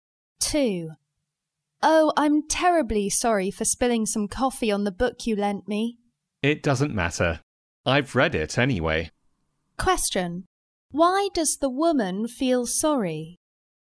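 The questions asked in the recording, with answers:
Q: Why does the woman feel sorry?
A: She spilled coffee on the book the man lent her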